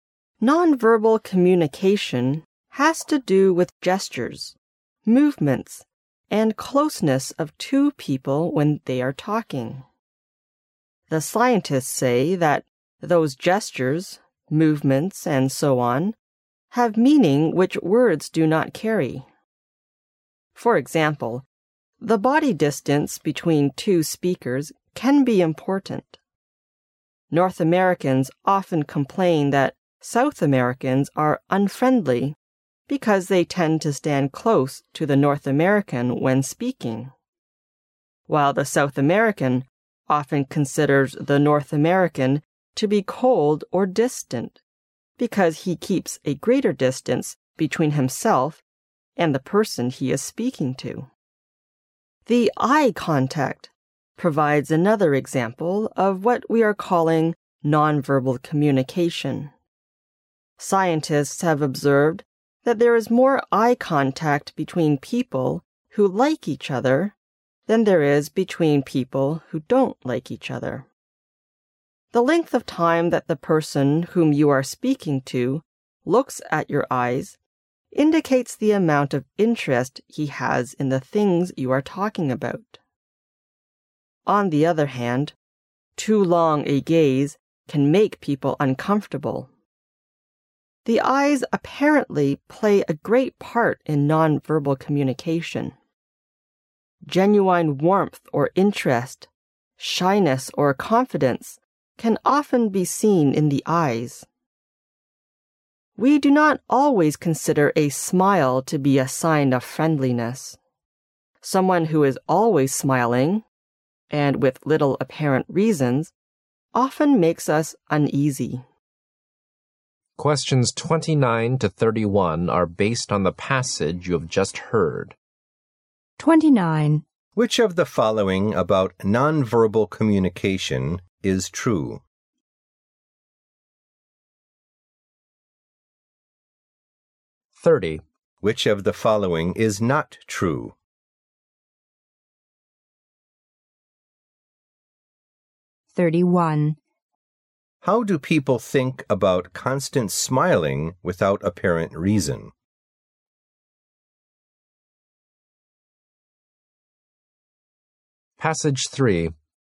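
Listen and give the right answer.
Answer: It makes people uneasy.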